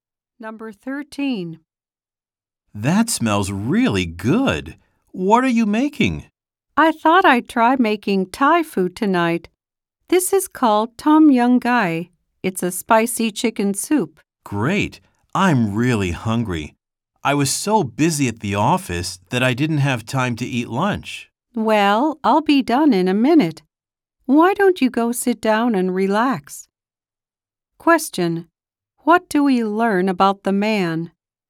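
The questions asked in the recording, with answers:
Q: What do we learn about the man?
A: He didn't have time to eat lunch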